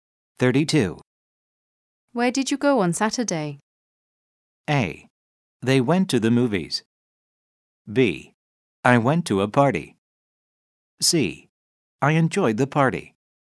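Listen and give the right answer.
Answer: B: I went to a party.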